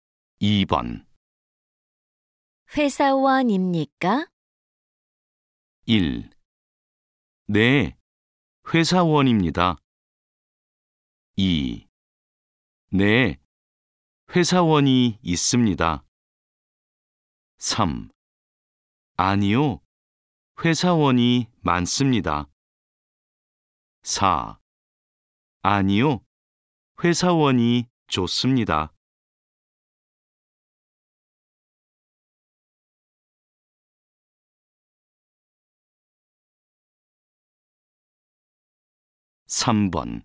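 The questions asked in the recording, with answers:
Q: 회사원입니까?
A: 1: 네, 회사원입니다.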